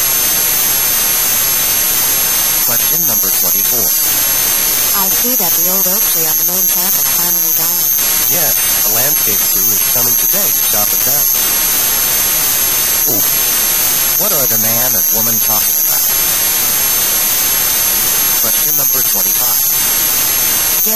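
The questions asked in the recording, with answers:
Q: What are the man and woman talking about?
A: The old oak tree that died and will be cut down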